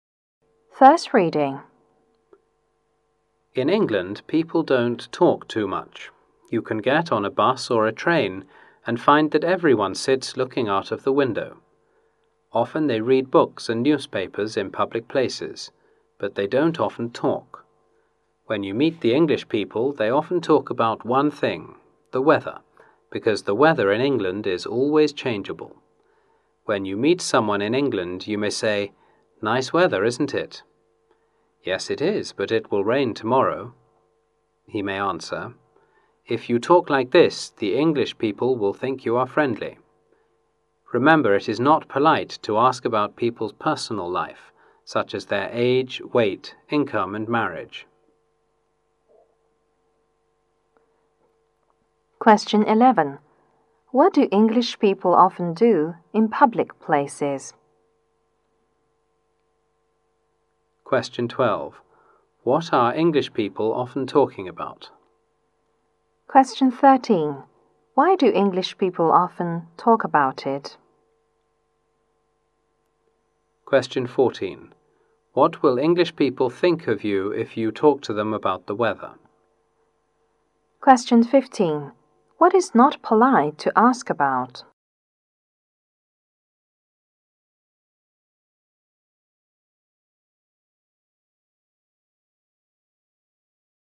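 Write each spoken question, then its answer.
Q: What do English people often do in public places?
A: Read books and newspapers

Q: What are English people often talking about?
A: The weather

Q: Why do English people often talk about it?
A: The weather is always changeable

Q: What will English people think of you if you talk to them about the weather?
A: You are friendly

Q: What is not polite to ask about?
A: People's personal life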